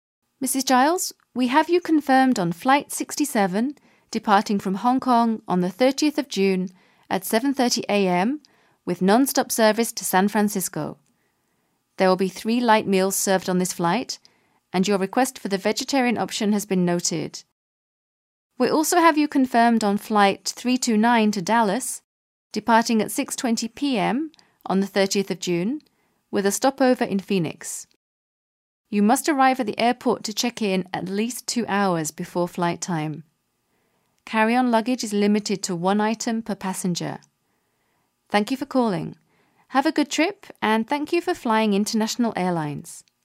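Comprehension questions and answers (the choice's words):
Listen to the short talk and choose the best answer for the following question:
Where does the speaker work?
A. International Airlines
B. A market research company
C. Hongkong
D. Flight 67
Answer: International Airlines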